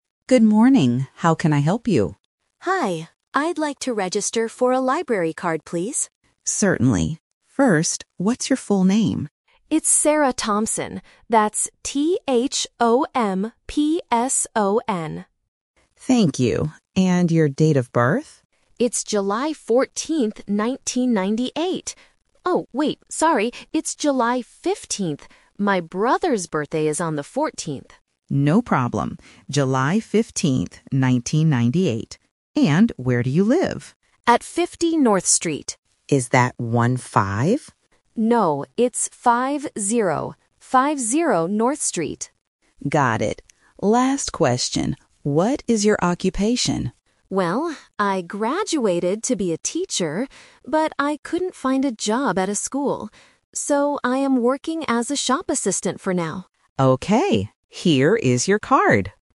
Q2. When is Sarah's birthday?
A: July 15th.

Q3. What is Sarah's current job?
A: A shop assistant.

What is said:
Librarian: Good morning. How can I help you?
Sarah: Hi. I'd like to register for a library card, please.
Librarian: Certainly. First, what's your full name?
Librarian: Thank you. And your date of birth?
Sarah: It's July 14th, 1998. Oh, wait... sorry, it's July 15th. My brother's birthday is on the 14th!
Librarian: No problem. July 15th, 1998. And where do you live?
Sarah: At 50 North Street.
Librarian: Got it. Last question: what is your occupation?
Sarah: Well, I graduated to be a teacher, but I couldn't find a job at a school. So, I am working as a shop assistant for now.
Librarian: Okay. Here is your card!